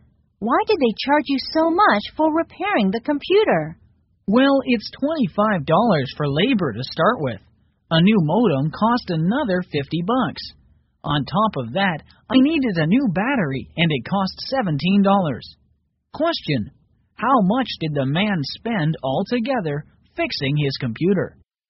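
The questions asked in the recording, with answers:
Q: how much did the man spend altogether fixing his computer?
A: $92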